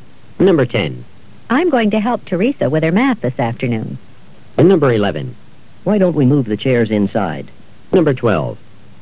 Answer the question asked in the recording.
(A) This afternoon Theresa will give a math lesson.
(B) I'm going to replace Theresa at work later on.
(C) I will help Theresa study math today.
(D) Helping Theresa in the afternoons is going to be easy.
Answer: (C) I will help Theresa study math today.

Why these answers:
I'm gong to help Theresa with her math this afternoon.